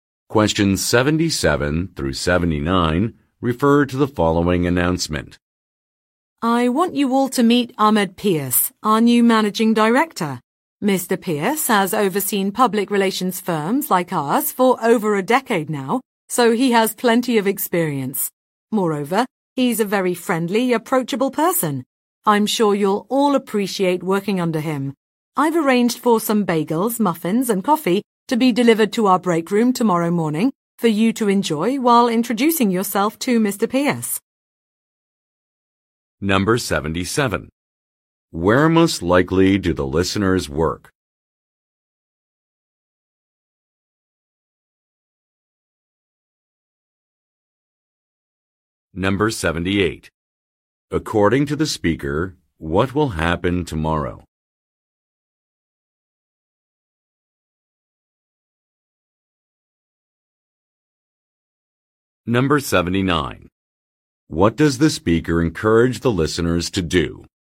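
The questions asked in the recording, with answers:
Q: Where most likely do the listeners work?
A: At a public relations firm

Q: According to the speaker, what will happen tomorrow?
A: Bagels, muffins and coffee will be delivered to the break room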